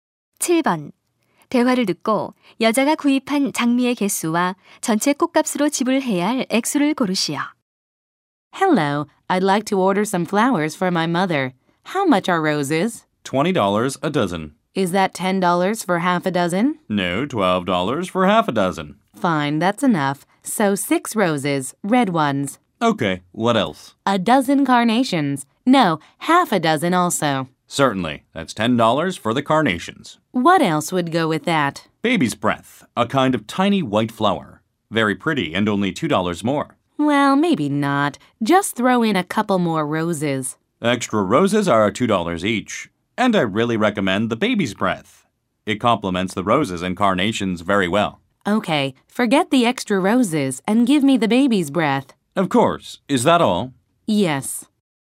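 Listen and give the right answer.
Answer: 장미 6송이, 24달러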